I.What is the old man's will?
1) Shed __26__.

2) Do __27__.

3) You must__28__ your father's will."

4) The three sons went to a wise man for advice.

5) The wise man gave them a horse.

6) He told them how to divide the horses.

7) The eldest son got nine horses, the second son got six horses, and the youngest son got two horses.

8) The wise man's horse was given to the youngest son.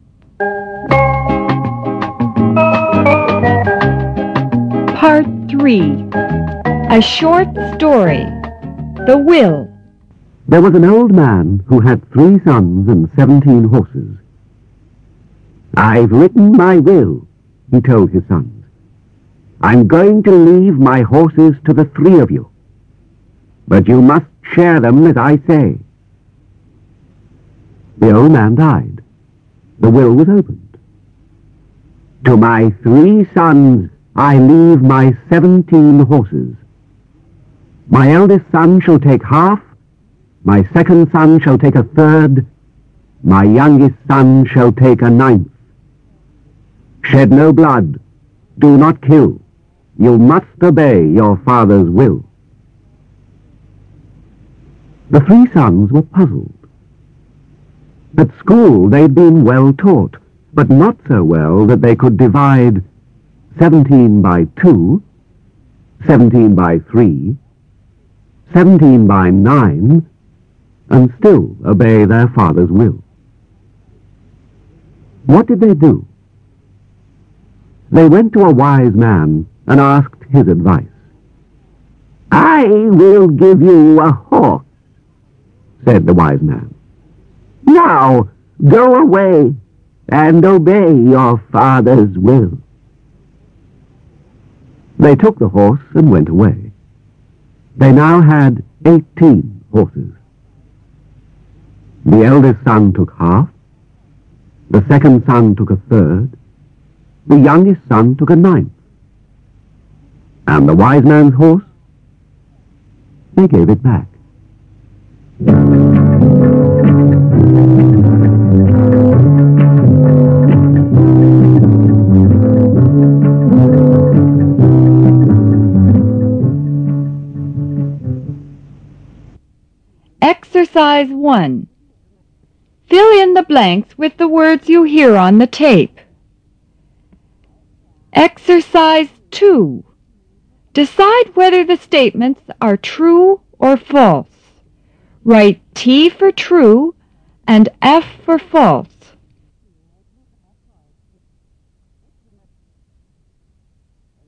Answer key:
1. no blood
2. not kill
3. obey
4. T
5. T
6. F
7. T
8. F

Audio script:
A Short Story ---- The Will (1'52")
There was an old man who had three sons and seventeen horses. "I've written my will," he told his sons. "I'm going to leave my horses to the three of you. But you must share them as I say."
The old man died. The will was opened. "To my three sons, I leave my seventeen horses. My eldest son shall take a half. My second son shall take a third. My youngest son shall take a ninth. Shed no blood. Do not kill. You must obey your father's will."
The three sons were puzzled. At school, they had been well-taught, but not so well that they could divide seventeen by two, seventeen by three, seventeen by nine, and still obey their father's will.
What did they do ? They went to a wise man and asked his advice. "I will give you a horse," said the wise man, "now go away and obey your father's will."
They took the horse and went away. They now had eighteen horses. The eldest son took a half, the second son took a third, the youngest son took a ninth, and the wise man' horse, they gave it back.